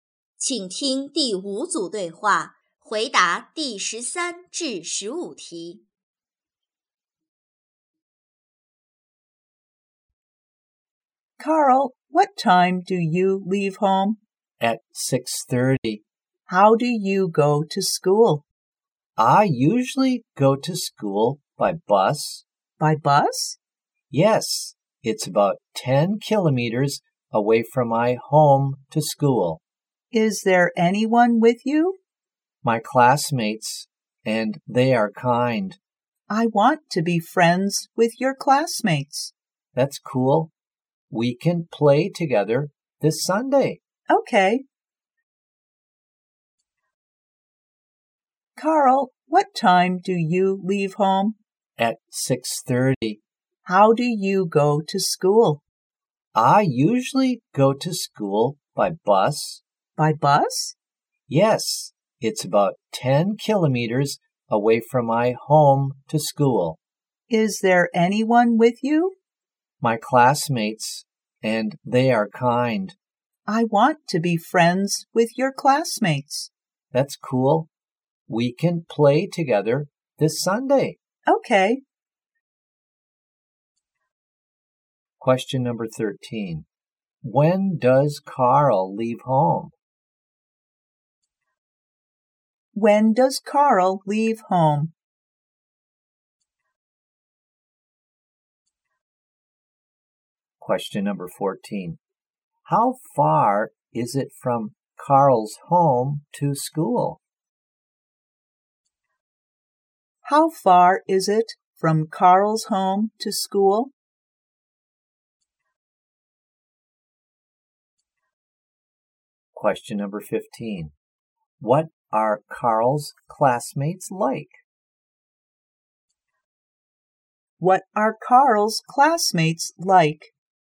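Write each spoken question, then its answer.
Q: When does Carl leave home?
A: At 6:30.

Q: How far is it from Carl's home to school?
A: About 10 kilometers.

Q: What are Carl's classmates like?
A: Kind.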